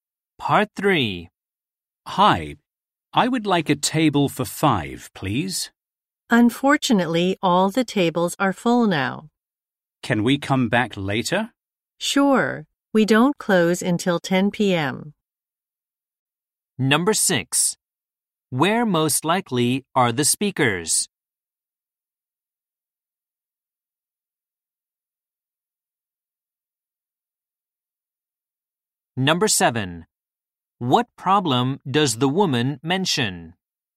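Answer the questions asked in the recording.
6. At a restaurant
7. All the tables are full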